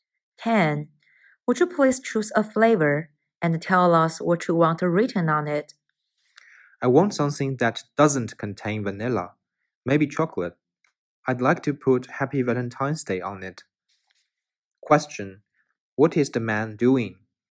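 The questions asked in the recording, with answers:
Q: What is the man doing?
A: Ordering a cake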